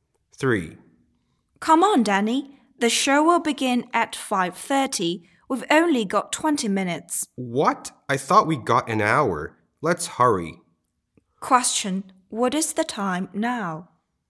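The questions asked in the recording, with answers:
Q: What is the time now?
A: 5:10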